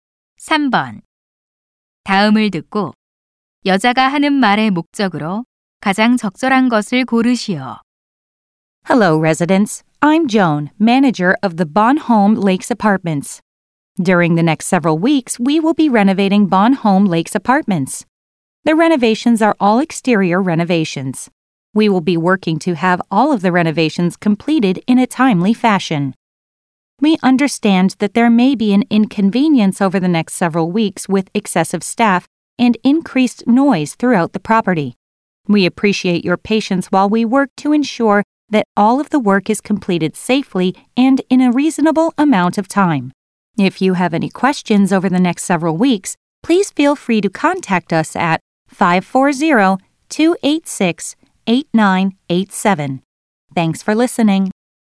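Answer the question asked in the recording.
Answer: 아파트 외부 보수 공사 일정을 안내하고 양해를 구하려고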